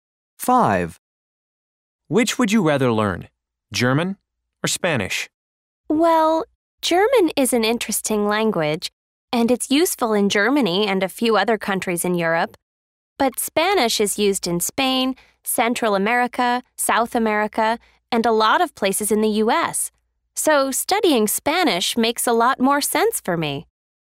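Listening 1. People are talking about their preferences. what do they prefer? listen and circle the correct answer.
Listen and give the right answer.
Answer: Spanish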